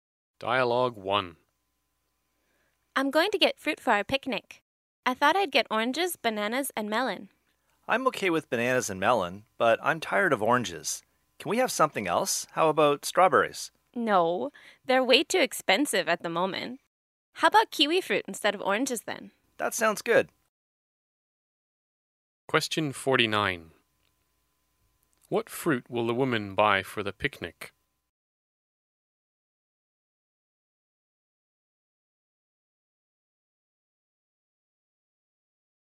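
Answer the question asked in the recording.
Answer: Bananas, melon and kiwi fruit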